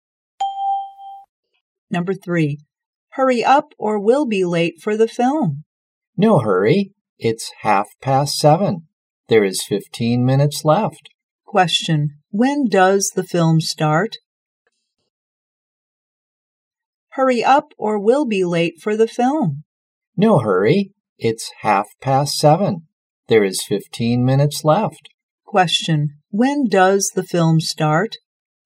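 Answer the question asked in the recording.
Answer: At 7:45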